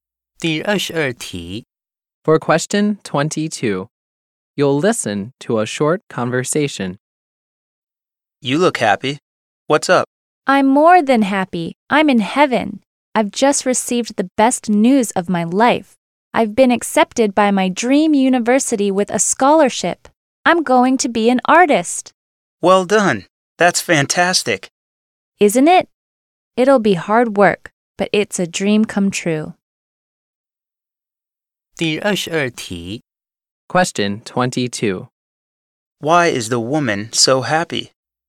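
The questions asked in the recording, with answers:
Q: Why is the woman so happy?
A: She was accepted by her dream university with a scholarship.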